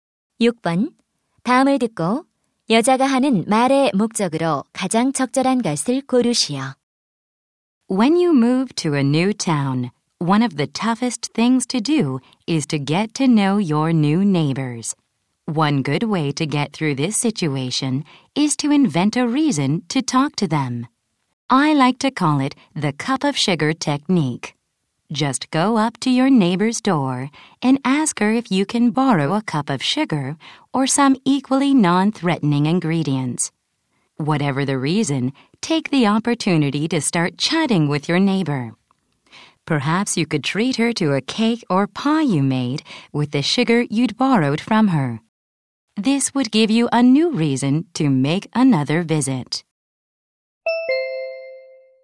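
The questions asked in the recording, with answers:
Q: 다음을 듣고 여자가 하는 말의 목적으로 가장 적절한 것을 고르시오.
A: 새 이웃과 친해지는 방법 제안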